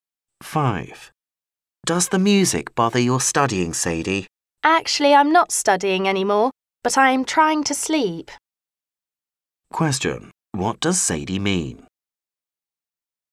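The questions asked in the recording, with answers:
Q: What does Sadie mean?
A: The music is keeping her from sleeping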